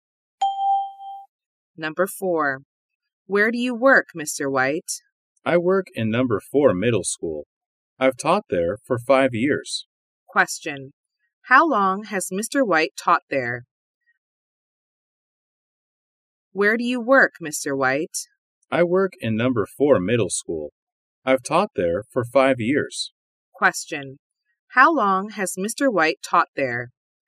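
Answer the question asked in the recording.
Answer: For 5 years.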